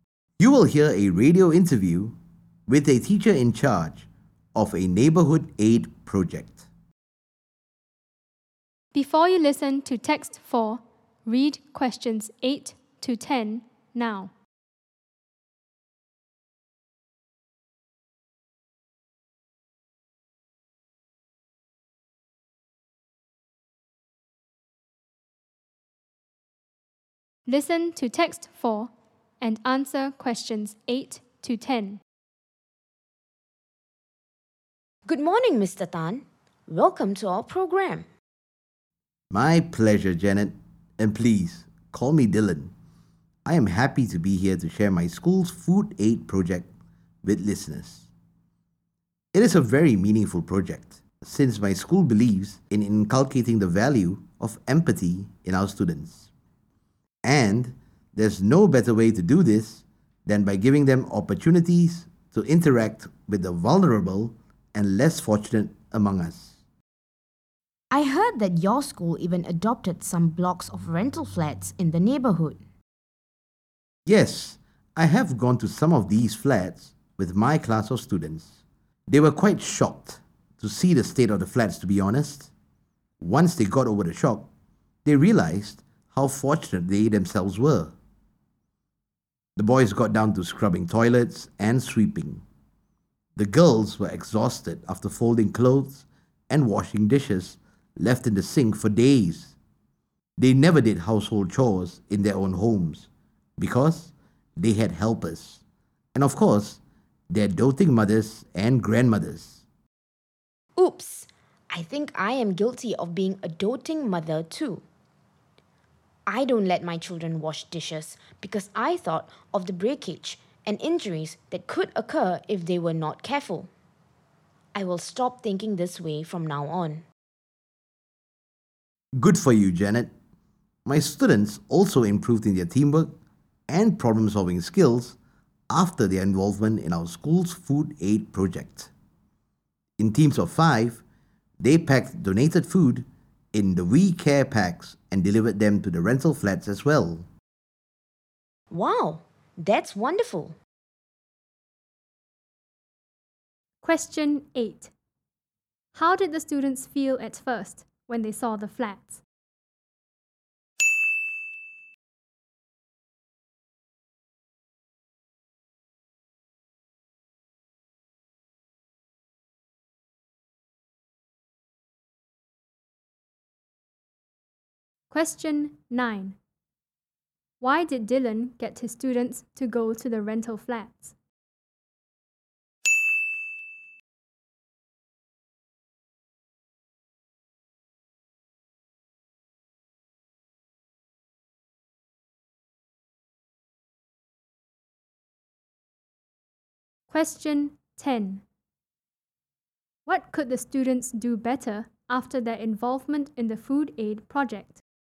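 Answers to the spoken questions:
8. Shocked
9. To build empathy by interacting with the vulnerable and less fortunate
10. Teamwork and problem-solving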